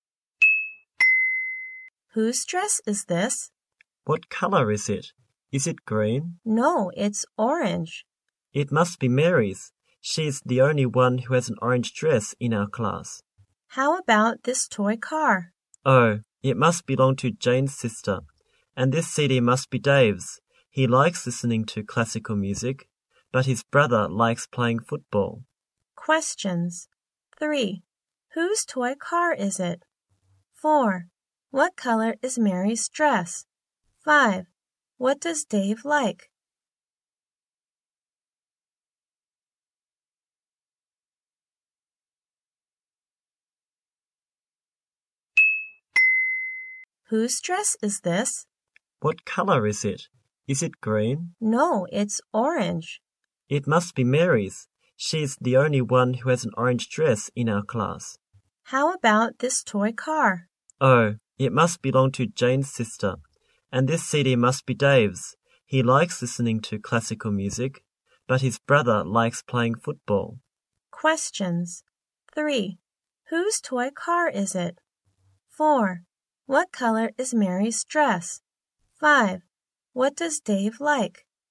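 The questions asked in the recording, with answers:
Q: Whose toy car is it?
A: Jane's sister's

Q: What color is Mary's dress?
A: Orange

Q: What does Dave like?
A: Listening to classical music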